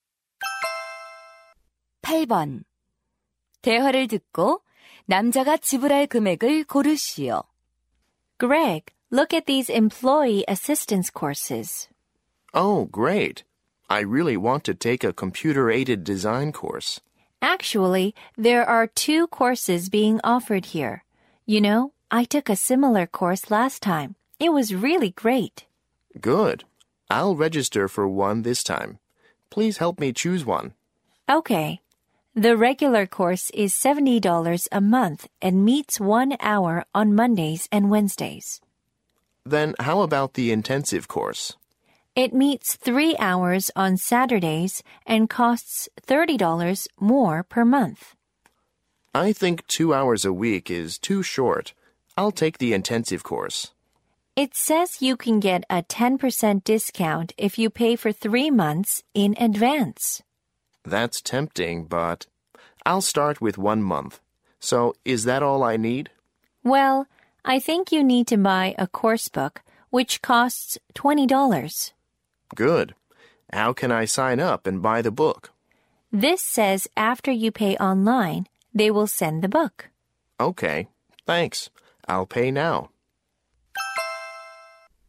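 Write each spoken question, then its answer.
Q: 대화를 듣고 남자가 지불할 금액을 고르시오.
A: $120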